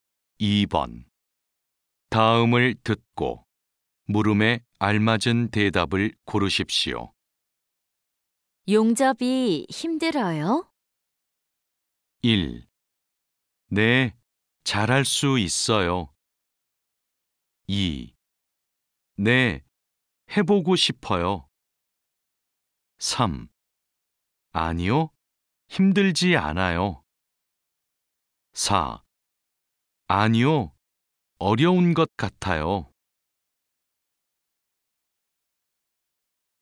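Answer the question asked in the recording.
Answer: 3: 아니요, 힘들지 않아요.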